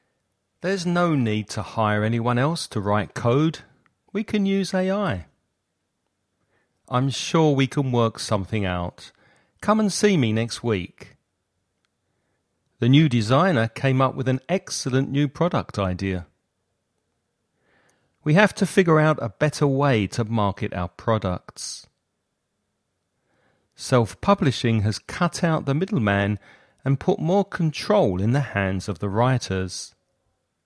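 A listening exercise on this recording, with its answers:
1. There's no need anyone else to write code. We can use AI.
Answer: to hire

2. I'm sure we can . Come and see me next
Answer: work something out

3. The new designer with an excellent new product idea.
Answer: came up

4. We have to a better way to market our products.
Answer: figure out

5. Self-publishing has the middleman and put more control in the hands of the writers.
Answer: cut out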